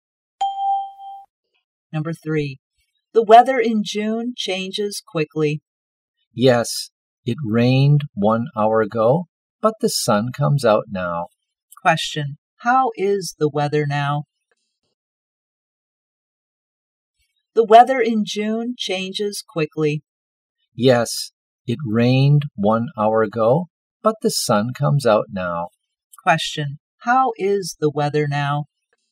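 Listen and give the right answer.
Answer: Sunny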